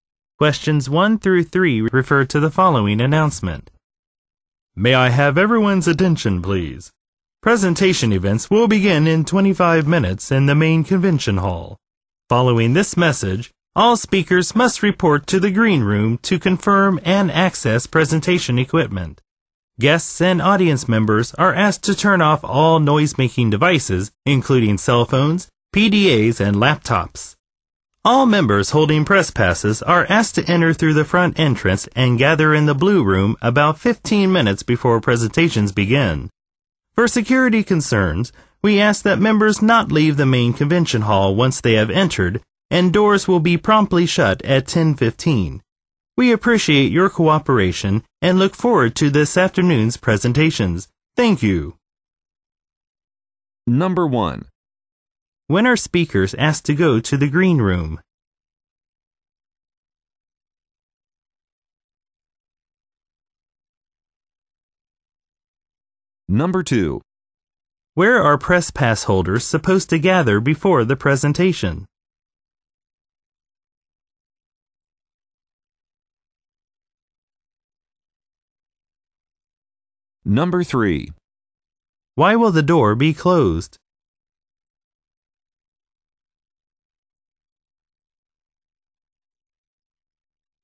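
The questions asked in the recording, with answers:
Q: When are speakers asked to go to the green room?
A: Following this message (right after the announcement)

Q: Where are press pass holders supposed to gather before the presentation?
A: In the blue room

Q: Why will the door be closed?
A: For security reasons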